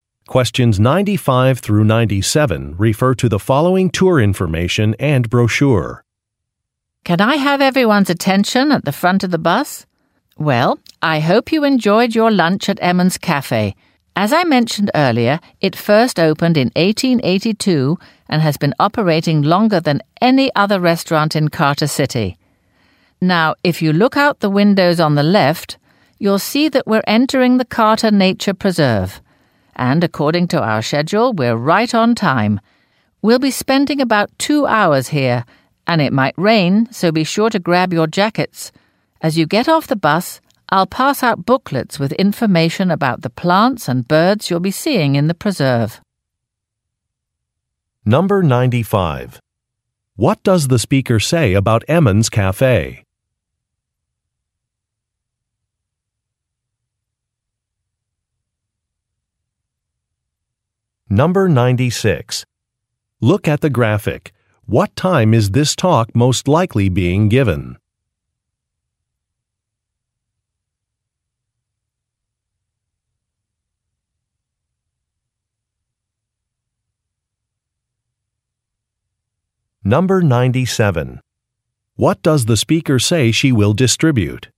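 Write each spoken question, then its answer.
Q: What does the speaker say about Emmons Cafe?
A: It has been operating longer than any other restaurant in Carter City (opened in 1882).

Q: What does the speaker say she will distribute?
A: Booklets about the plants and birds in the preserve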